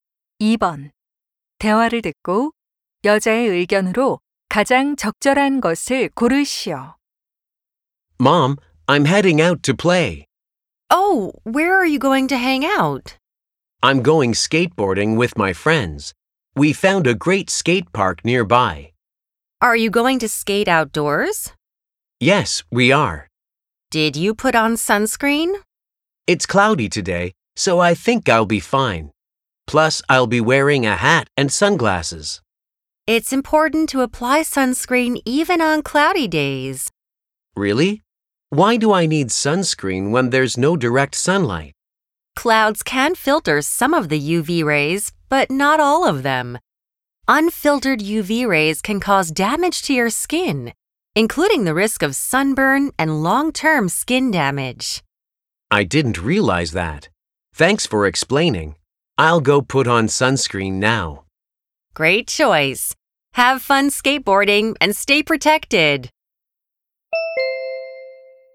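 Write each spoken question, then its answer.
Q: 대화를 듣고 여자의 의견으로 가장 적절한 것을 고르시오.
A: 흐린 날에도 자외선 차단제를 발라야 한다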